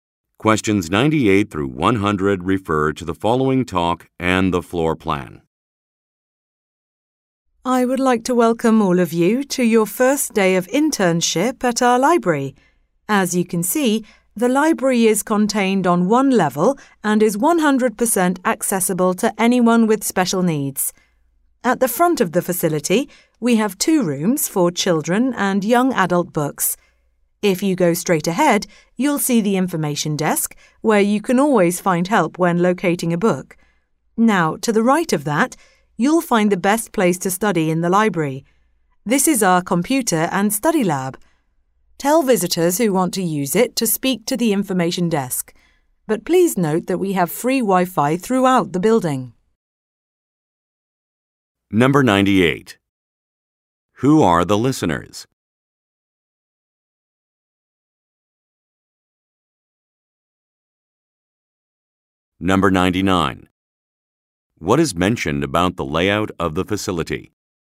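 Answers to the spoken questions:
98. New library interns
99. It is all on one level and fully accessible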